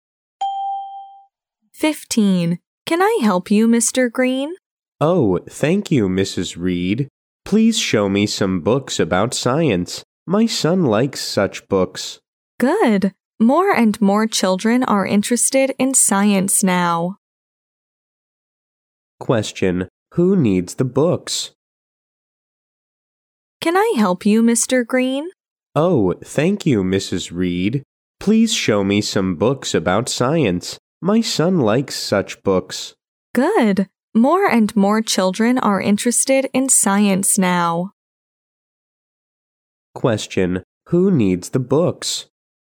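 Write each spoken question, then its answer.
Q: who needs the books?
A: Mr. Green's son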